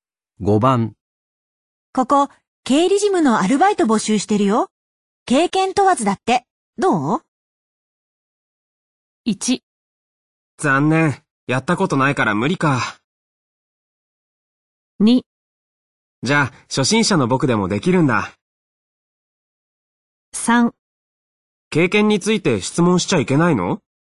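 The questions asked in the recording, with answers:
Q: ここ、経理事務のアルバイト募集してるよ。経験問わずだって。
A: 2: じゃあ、初心者の僕でもできるんだ。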